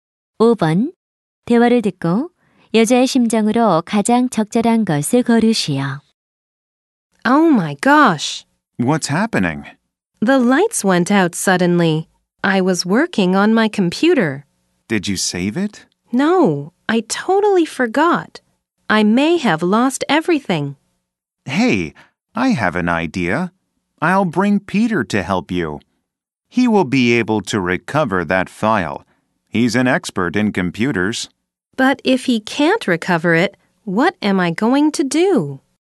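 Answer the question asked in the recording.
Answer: 걱정스러운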